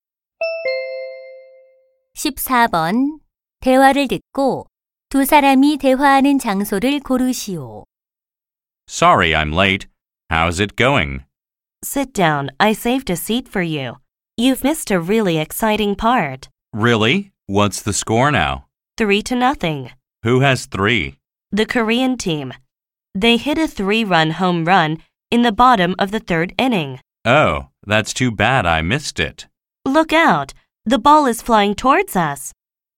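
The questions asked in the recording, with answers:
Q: 대화를 듣고 두 사람이 대화하는 장소를 고르시오.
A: 야구장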